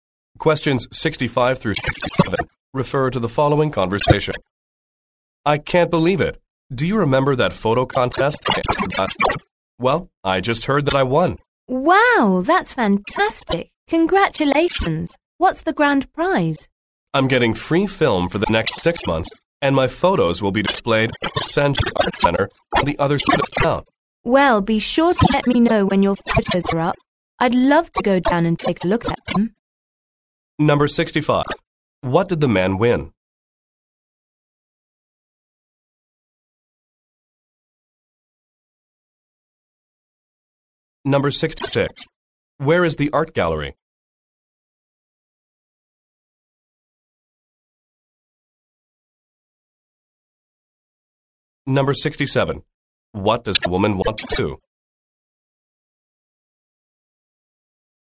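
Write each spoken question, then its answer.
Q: What did the man win?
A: A photo contest: free film for 6 months and a display of his photos

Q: Where is the art gallery?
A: On the other side of town

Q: What does the woman want to do?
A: See his photos on display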